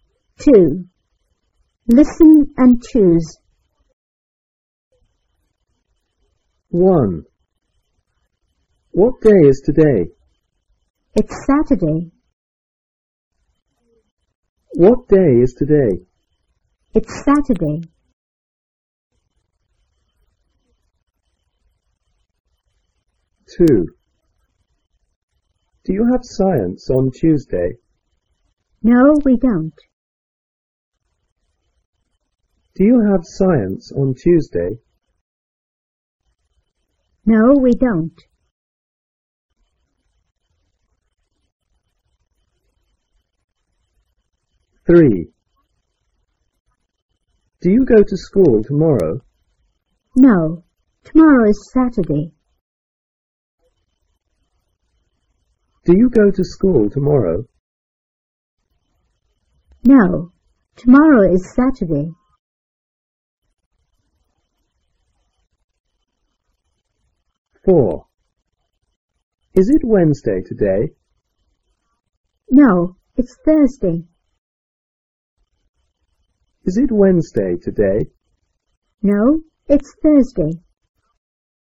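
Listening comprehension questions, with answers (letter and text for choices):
2.listen and choose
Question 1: What day is it today? It's Saturday.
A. Today is Sunday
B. Today is Saturday.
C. Today is Thursday.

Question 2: Do you have Science on Tuesday? No,we don't.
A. We have Science on Tuesday.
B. We don't have Science on Tuesday.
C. We don't have Music on Tuesday.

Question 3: Do you go to school tomorrow?No,tomorrow is Saturday.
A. I go to school every day.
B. I go to school on Saturday.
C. I don't go to school on Saturday.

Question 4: Is it Wednesday today? No,it's Thursday.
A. Today is Tuesday.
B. Today is Wednesday.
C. Today is Thursday.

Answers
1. B. Today is Saturday.
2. B. We don't have Science on Tuesday.
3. C. I don't go to school on Saturday.
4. C. Today is Thursday.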